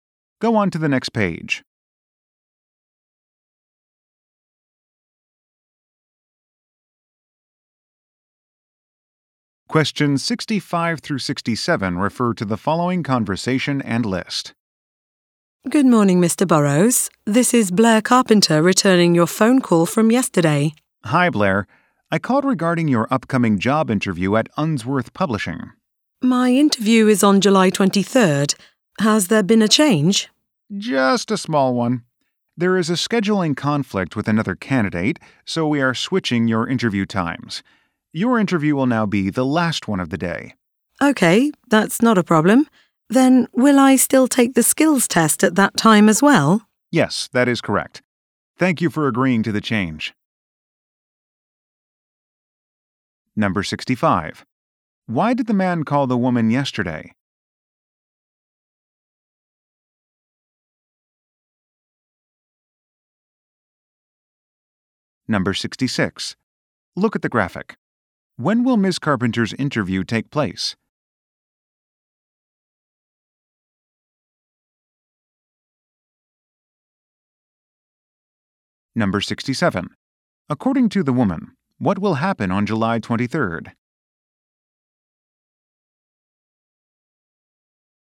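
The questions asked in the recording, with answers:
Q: Why did the man call the woman yesterday?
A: To change her interview time

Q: According to the woman, what will happen on July 23rd?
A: Her job interview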